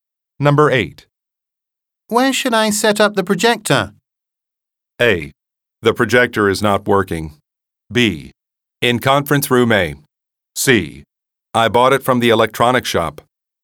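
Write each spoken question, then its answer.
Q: Where should I set up the projector?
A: B: In conference room A.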